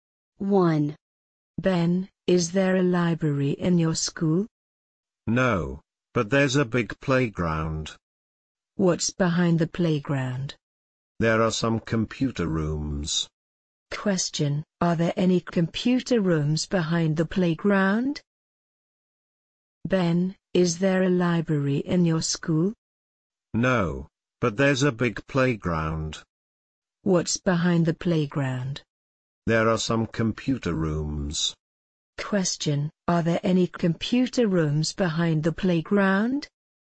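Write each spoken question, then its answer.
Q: Question, are there any computer rooms behind the playground?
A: Yes, there are.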